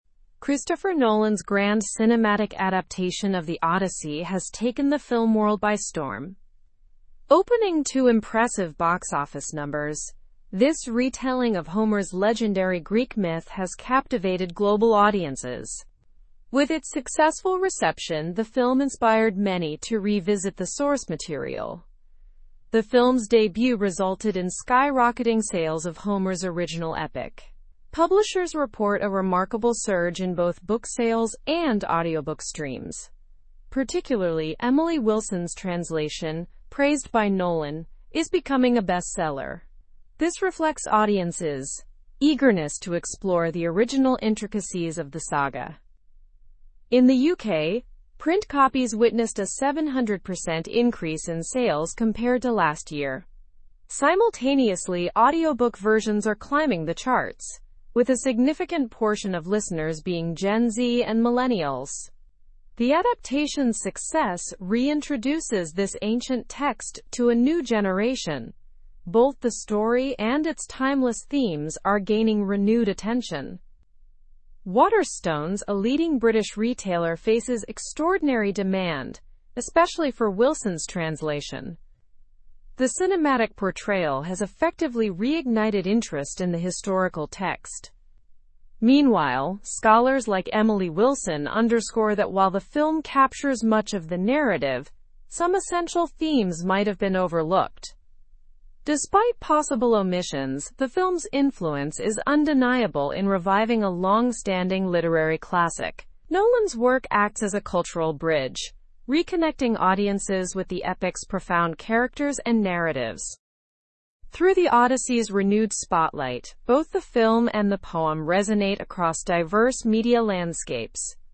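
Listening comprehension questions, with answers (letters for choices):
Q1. What record did Nolan's film adaptation of The Odyssey achieve at the box office?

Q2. What impact did the film have on sales of Homer's original work?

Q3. Who is the author of the translation that gained popularity after the film's release?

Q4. How much did the sales of print copies of The Odyssey increase in the UK?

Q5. Which demographics are significantly listening to the audiobook version of The Odyssey?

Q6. What role does Waterstones play regarding the demand for The Odyssey?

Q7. What might be a limitation of the film adaptation noted by scholars?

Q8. What has Christopher Nolan's adaptation of The Odyssey achieved?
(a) Disappointed audiences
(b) Taken the film world by storm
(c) Been poorly received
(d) Not influenced book sales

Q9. Which version of The Odyssey has seen increased sales?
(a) An unknown translation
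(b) Emily Wilson's translation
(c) A 19th-century translation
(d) None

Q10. How have sales of The Odyssey in the UK changed?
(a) They decreased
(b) They remained the same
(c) They dropped slightly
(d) They increased by 700%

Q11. Which group has shown an increased interest in audiobook versions of The Odyssey?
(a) Baby boomers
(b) Only scholars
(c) No particular group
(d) Gen Z and millennials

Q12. What role does Waterstones play in relation to The Odyssey?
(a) Decreases demand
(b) Has no copies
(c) Faces extraordinary demand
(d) Is uninterested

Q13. What does Emily Wilson believe about the film?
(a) Some themes might have been overlooked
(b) It captures every theme perfectly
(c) It has no narrative at all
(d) It disregards the original entirely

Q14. What impact did the film have on the status of The Odyssey?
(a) Reduced its popularity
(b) Made it irrelevant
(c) Revived a literary classic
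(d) Cause minimal attention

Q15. What has Nolan's work acted as in relation to audiences?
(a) A cultural bridge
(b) A divisive factor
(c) An isolated piece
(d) A confusing story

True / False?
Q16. Nolan's work fails to connect audiences with The Odyssey's shallow narratives.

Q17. There has been a minor decrease in demand for print copies of The Odyssey in the UK.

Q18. Waterstones is ignoring significant demand for The Odyssey.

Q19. Gen Z and millennials are major consumers of The Odyssey's audiobook versions.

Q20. Emily Wilson's translation of The Odyssey is becoming a bestseller due to Nolan's film.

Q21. The film has reignited interest in The Odyssey as a literary classic.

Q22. The adaptation by Nolan has had a successful reception globally.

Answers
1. It opened to impressive numbers and took the film world by storm.
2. There was a remarkable surge in both book sales and audiobook streams.
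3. Emily Wilson is the translator.
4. Sales increased by 700% compared to last year.
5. Gen Z and millennials are a significant portion of listeners.
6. Waterstones is experiencing extraordinary demand, especially for Wilson's translation.
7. Essential themes might have been overlooked.
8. b
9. b
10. d
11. d
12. c
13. a
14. c
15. a
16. False
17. False
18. False
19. True
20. True
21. True
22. True

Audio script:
Christopher Nolan's grand cinematic adaptation of The Odyssey has taken the film world by storm. Opening to impressive box office numbers, this retelling of Homer's legendary Greek myth has captivated global audiences. With its successful reception, the film inspired many to revisit the source material.
The film's debut resulted in skyrocketing sales of Homer's original epic. Publishers report a remarkable surge in both book sales and audiobook streams. Particularly, Emily Wilson's translation, praised by Nolan, is becoming a bestseller. 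This reflects audiences' eagerness to explore the original intricacies of the saga.
In the UK, print copies witnessed a 700% increase in sales compared to last year. Simultaneously, audiobook versions are climbing the charts, with a significant portion of listeners being Gen Z and millennials. The adaptation's success reintroduces this ancient text to a new generation. Both the story and its timeless themes are gaining renewed attention.
Waterstones, a leading British retailer, faces extraordinary demand, especially for Wilson's translation. The cinematic portrayal has effectively reignited interest in the historical text. Meanwhile, scholars like Emily Wilson underscore that while the film captures much of the narrative, some essential themes might have been overlooked.
Despite possible omissions, the film's influence is undeniable in reviving a long-standing literary classic. Nolan's work acts as a cultural bridge, reconnecting audiences with the epic's profound characters and narratives. 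Through The Odyssey's renewed spotlight, both the film and the poem resonate across diverse media landscapes.

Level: Level 4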